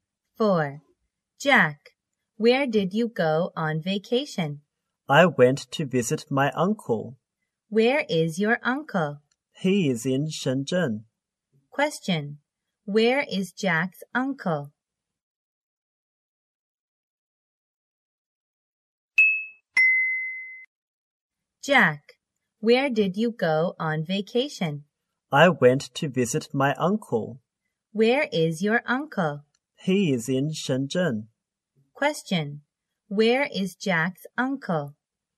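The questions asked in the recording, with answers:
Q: Where is Jack's uncle?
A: In Shenzhen.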